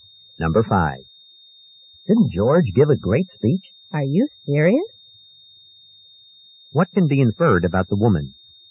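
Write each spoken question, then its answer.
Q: What can be inferred about the woman?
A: She did not think George's speech was good.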